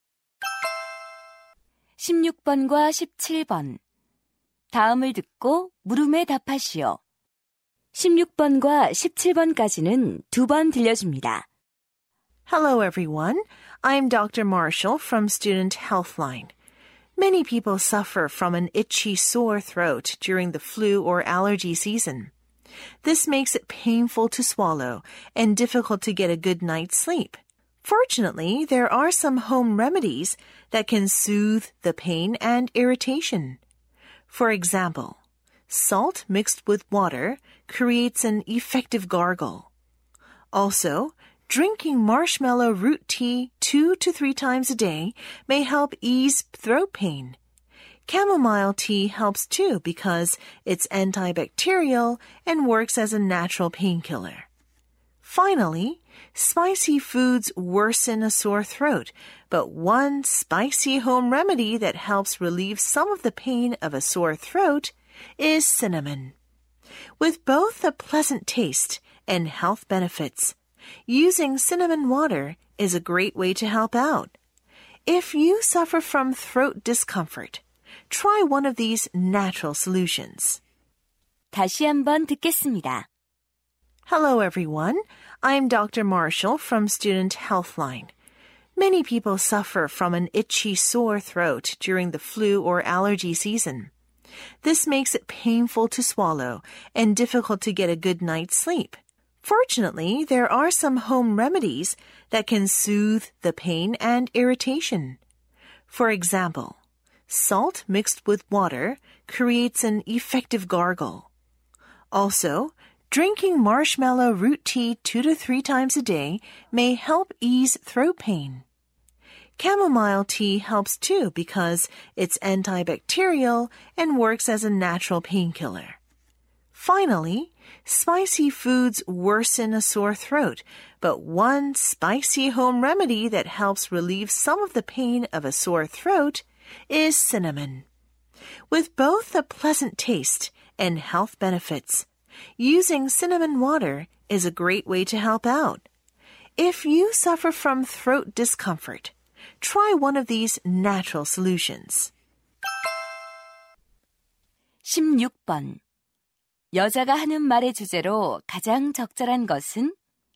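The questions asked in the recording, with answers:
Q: 여자가 하는 말의 주제로 가장 적절한 것은?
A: 인후통을 완화하는 천연 가정 요법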